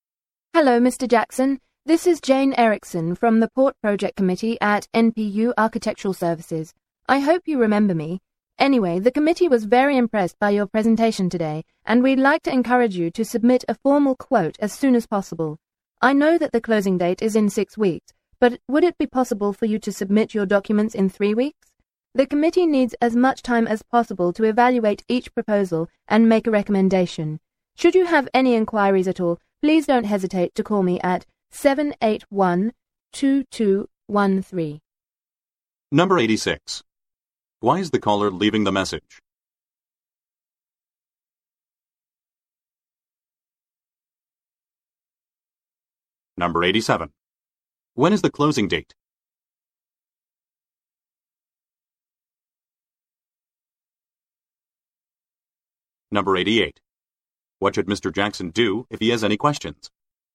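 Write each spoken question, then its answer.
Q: Why is the caller leaving the message?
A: To ask Mr. Jackson to submit a formal quote early, in 3 weeks

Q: When is the closing date?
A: In 6 weeks

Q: What should Mr. Jackson do if he has any questions?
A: Call Jane Erickson at 781-2213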